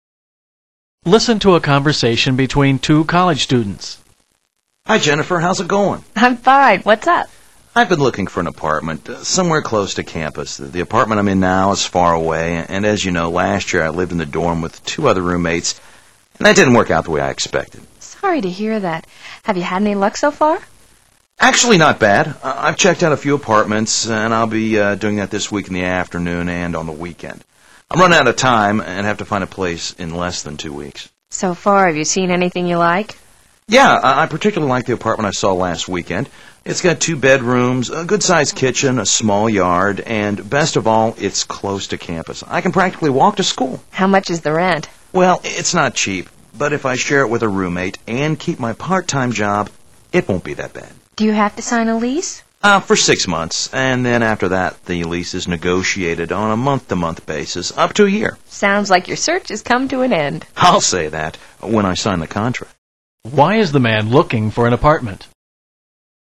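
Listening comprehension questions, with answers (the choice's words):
Why is the man looking for an apartment?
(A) He can't afford his rent.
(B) His present place is too cramped.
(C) His roommate doesn't like the apartment.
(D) He wants to be close to campus.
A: He wants to be close to campus.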